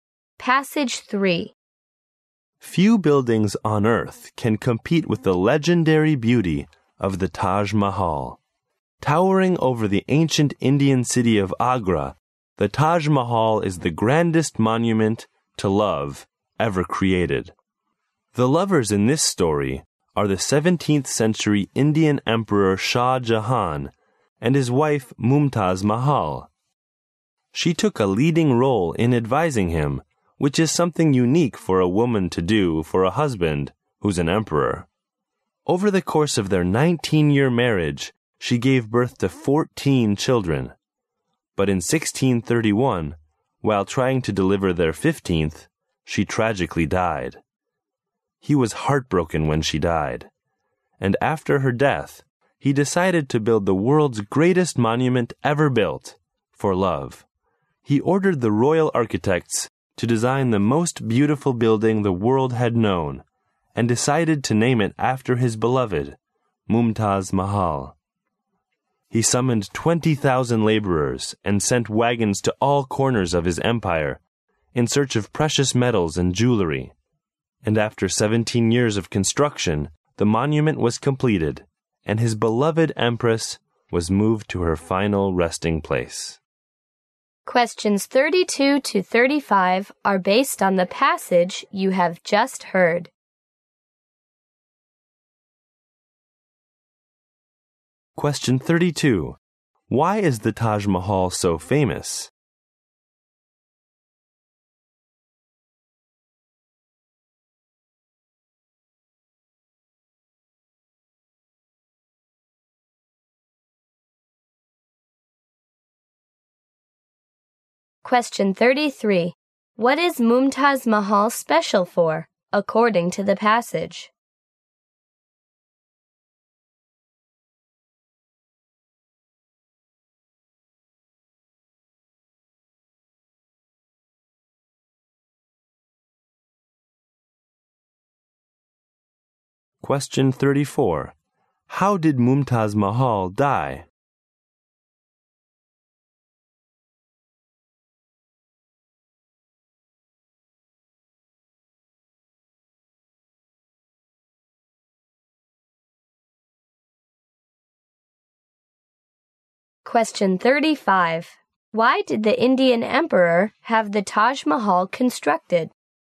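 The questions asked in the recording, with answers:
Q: Why is the Taj Mahal so famous?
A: It is the grandest monument to love ever created

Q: What is Mumtaz Mahal special for, according to the passage?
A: She took a leading role in advising her emperor husband

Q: How did Mumtaz Mahal die?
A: While giving birth to her 15th child

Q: Why did the Indian Emperor have the Taj Mahal constructed?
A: In memory of his beloved wife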